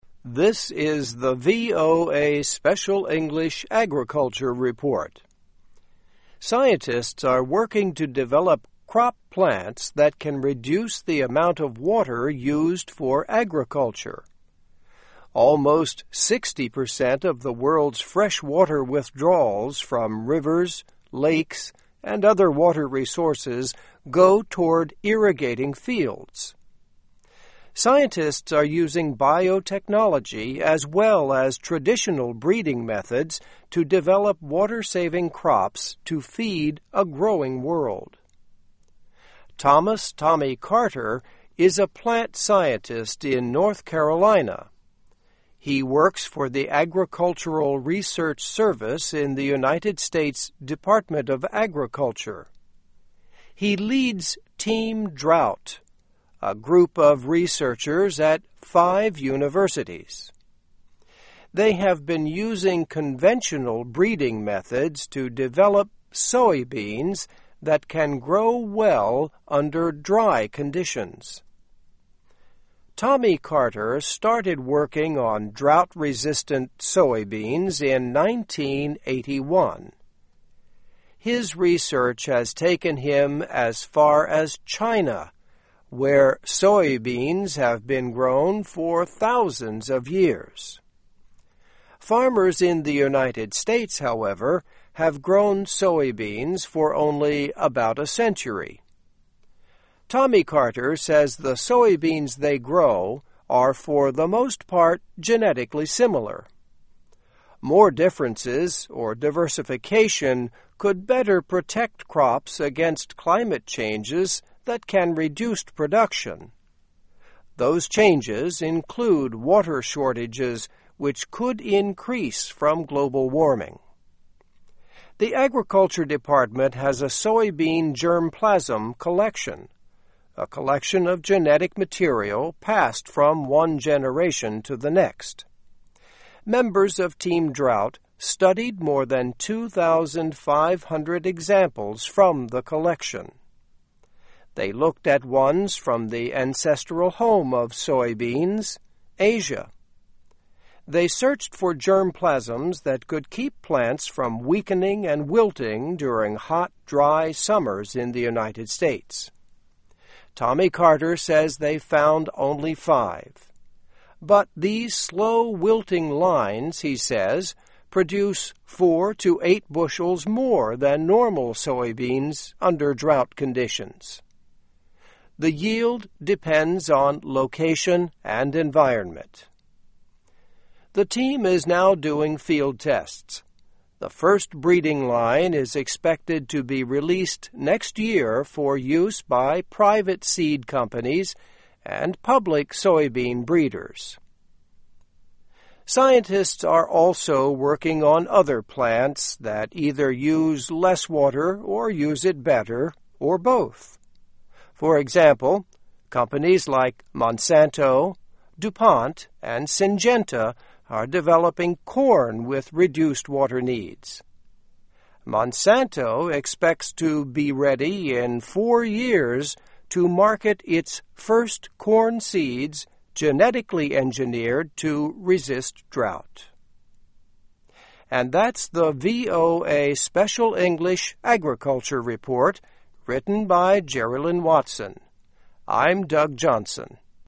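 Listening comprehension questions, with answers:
Escucha el audio y completa los recuadros.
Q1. Scientists are working to Control crop plants that can reduce the amount of water used for agriculture.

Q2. Almost sixty percent of the world's freshwater withdrawals from rivers, lakes and other water resources go toward Control fields.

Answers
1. develop
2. irrigating

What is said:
Scientists are using biotechnology as well as traditional breeding methods to develop water-saving crops to feed a growing world.
Thomas "Tommy" Carter is a plant scientist in North Carolina. He works for the Agricultural Research Service in the United States Department of Agriculture. He leads Team Drought, a group of researchers at five universities. They have been using conventional Control methods to develop soybeans that can grow well under dry conditions.Tommy Carter started working on drought-resistant soybeans in nineteen eighty-one. 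His research has taken him as far as China, where soybeans have been grown for thousands of years.
Farmers in the United States, however, have grown soybeans for only about a Control. Tommy Carter says the soybeans they grow are for the most part genetically similar. More differences, or diversification, could better protect crops against climate changes that can reduce production. Those changes include water Control which could increase from global warming.
The Agriculture Department has a soybean germplasm collection, a collection of genetic material passed from one generation to the next. Members of Team Drought studied more than two thousand five hundred examples from the collection.
They looked at ones from the ancestral home of soybeans, Asia. They searched for germplasms that could keep plants from Control and wilting during hot, dry summers in the United States.
Tommy Carter says they found only five. 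But these slow-wilting lines, he says, produce four to eight Control more than normal soybeans under drought conditions. The yield depends on location and environment.
The team is now doing Control tests. The first breeding line is expected to be released next year for use by private seed companies and public soybean Control.
Scientists are also working on other plants that either use less water or use it Control, or both. For example, companies like Monsanto, DuPont and Syngenta are developing corn with reduced water needs. Monsanto expects to be ready in four years to market its first Control seeds genetically engineered to resist drought.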